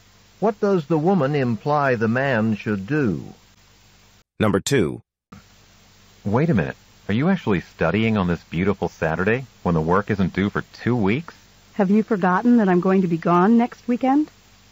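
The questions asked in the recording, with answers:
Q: What does the woman imply?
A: She must study now because she will be away next weekend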